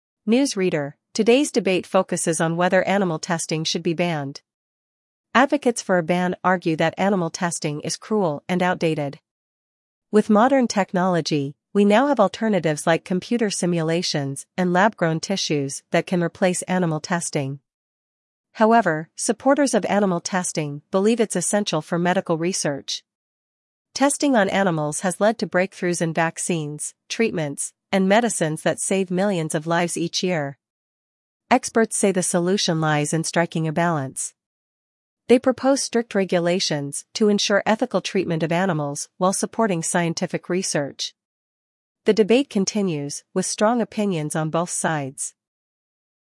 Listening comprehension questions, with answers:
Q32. What is the debate about?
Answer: Animal testing

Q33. What argument do supporters of a ban provide?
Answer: It's cruel and outdated

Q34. What alternatives to animal testing are mentioned?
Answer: Simulations and lab-grown tissues

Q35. What do supporters of animal testing argue?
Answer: It's necessary for medical research

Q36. What medical advancements have resulted from animal testing?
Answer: Vaccines and treatments

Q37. What solution do experts suggest?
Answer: Strict regulations for ethical treatment

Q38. What does the news reader conclude about the debate?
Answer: Opinions remain divided

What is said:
News Reader: Today's debate focuses on whether animal testing should be banned. Advocates for a ban argue that animal testing is cruel and outdated. With modern technology, we now have alternatives like computer simulations and lab-grown tissues that can replace animal testing.
However, supporters of animal testing believe it's essential for medical research. Testing on animals has led to breakthroughs in vaccines, treatments, and medicines that save millions of lives each year.
Experts say the solution lies in striking a balance. They propose strict regulations to ensure ethical treatment of animals while supporting scientific research.
The debate continues, with strong opinions on both sides.